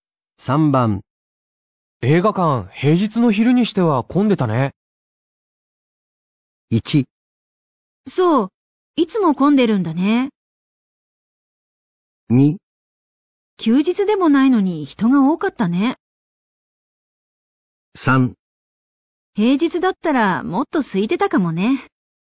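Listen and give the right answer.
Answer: 2: 休日でもないのに人が多かったね。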